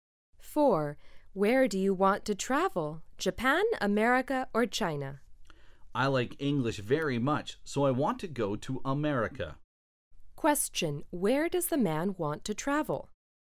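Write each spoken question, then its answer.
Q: Where does the man want to travel?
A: America.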